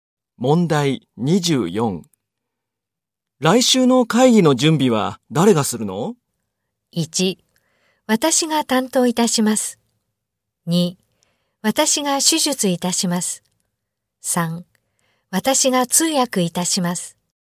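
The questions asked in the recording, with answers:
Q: 来週の会議の準備は誰がするの?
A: 1: 私が担当いたします。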